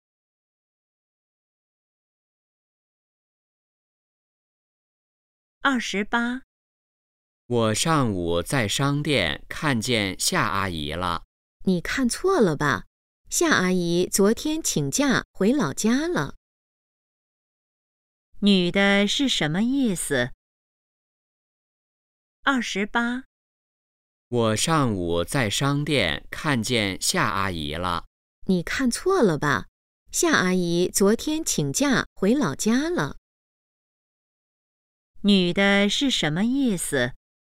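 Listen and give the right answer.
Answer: 男的看错了,夏阿姨回老家了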